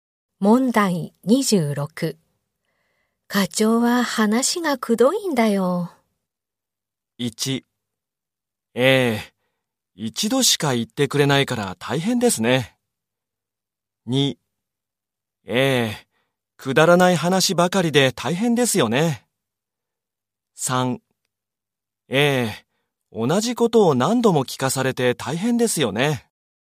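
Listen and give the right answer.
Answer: 3: ええ、同じことを何度も聞かされて大変ですよね。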